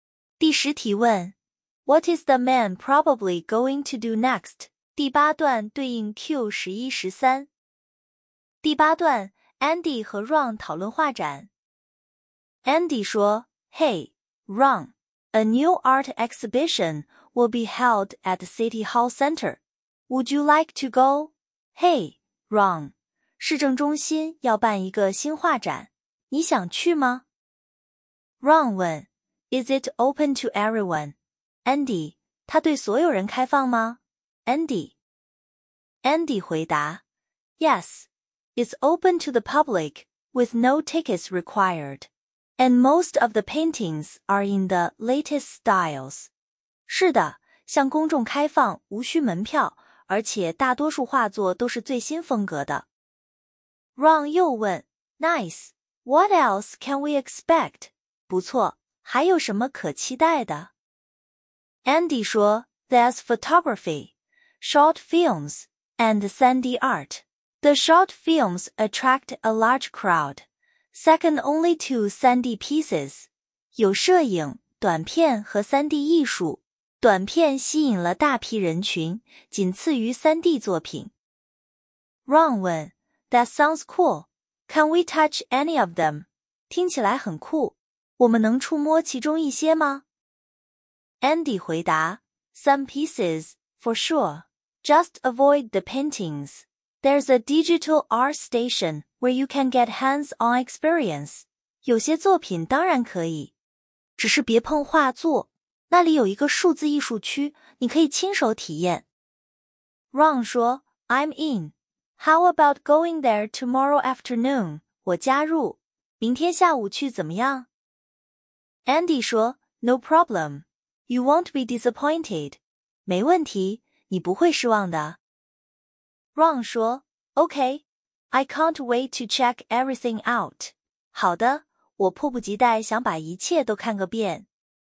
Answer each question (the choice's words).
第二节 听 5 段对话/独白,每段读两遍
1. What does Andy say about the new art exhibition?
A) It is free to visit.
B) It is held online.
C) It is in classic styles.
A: It is free to visit.

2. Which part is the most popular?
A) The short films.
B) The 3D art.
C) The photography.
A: The 3D art.

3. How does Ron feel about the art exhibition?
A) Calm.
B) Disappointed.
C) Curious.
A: Curious.

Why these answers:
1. no tickets required = 免费 → A;latest styles 与"经典"相反(排除 C);线下办(排除 B)。
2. short films second only to 3D pieces = 短片仅次于 3D → 3D 第一 → B。
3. I can't wait to check everything out = 迫不及待 → 好奇/感兴趣。

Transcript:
Andy: Hey, Ron, a new art exhibition will be held at City Hall Center. Would you like to go?
嘿,Ron,市政中心要办一个新画展。你想去吗?
Ron: Is it open to everyone, Andy?
它对所有人开放吗,Andy?
Andy: Yes, it's open to the public with no tickets required, and most of the paintings are in the latest styles.
是的,向公众开放、无需门票,而且大多数画作都是最新风格的。
Ron: Nice. What else can we expect?
不错。还有什么可期待的?
Andy: There's photography, short films, and 3D art. The short films attract a large crowd, second only to 3D pieces.
有摄影、短片和 3D 艺术。短片吸引了大批人群,仅次于 3D 作品。
Ron: That sounds cool. Can we touch any of them?
听起来很酷。我们能触摸其中一些吗?
Andy: Some pieces, for sure. Just avoid the paintings. There's a digital art station where you can get hands-on experience.
有些作品当然可以,只是别碰画作。那里有一个数字艺术区,你可以亲手体验。
Ron: I'm in. How about going there tomorrow afternoon?
我加入。明天下午去怎么样?
Andy: No problem. You won't be disappointed.
没问题,你不会失望的。
Ron: Okay. I can't wait to check everything out.
好的,我迫不及待想把一切都看个遍。
Q11. What does Andy say about the new art exhibition? 关于这个新画展,Andy 怎么说? 答案 A
A. 参观免费 B.

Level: 高中